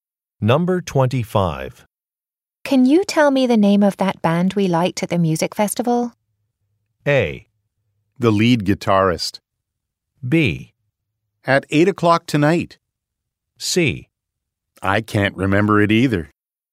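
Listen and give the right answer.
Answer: C: I can't remember it either.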